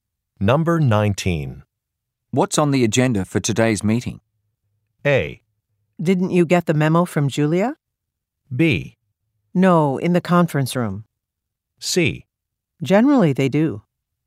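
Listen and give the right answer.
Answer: A: Didn't you get the memo from Julia?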